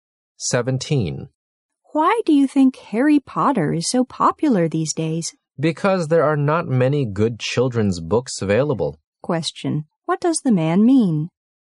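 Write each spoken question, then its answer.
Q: what does the man mean?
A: There aren't many good children's books available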